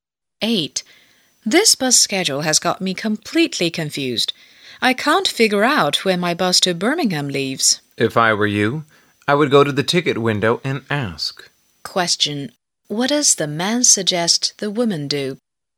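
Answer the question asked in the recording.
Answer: Go to the ticket window and ask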